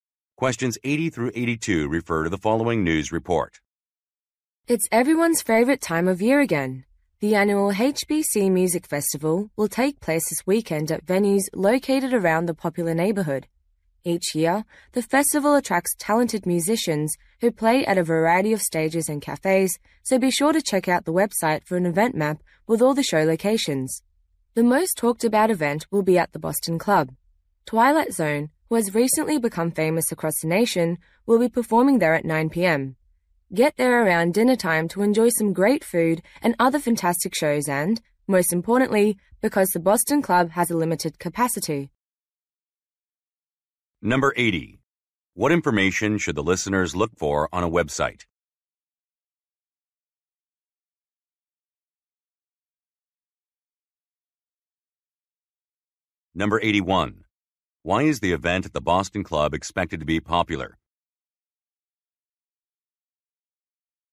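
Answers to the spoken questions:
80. An event map with show locations
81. A nationally famous band, Twilight Zone, is performing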